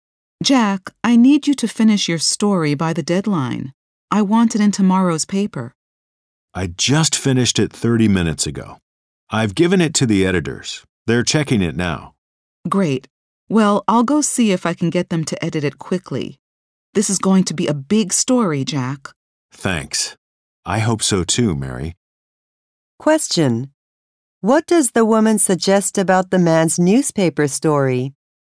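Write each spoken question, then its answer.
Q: What does the woman suggest about the man's newspaper story?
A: It is going to be a big story.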